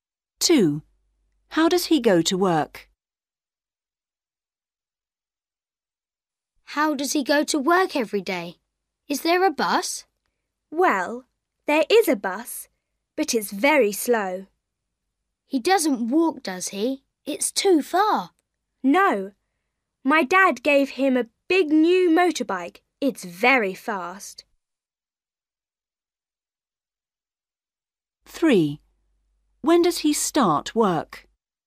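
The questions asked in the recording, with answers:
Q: How does he go to work?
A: by motorbike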